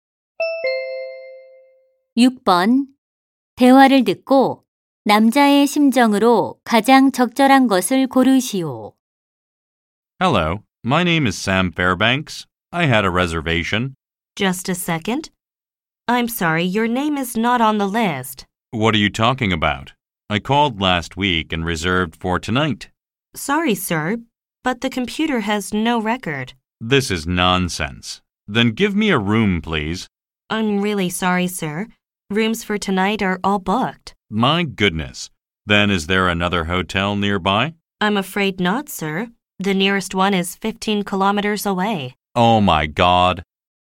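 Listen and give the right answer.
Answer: 화가 나고 당황스러움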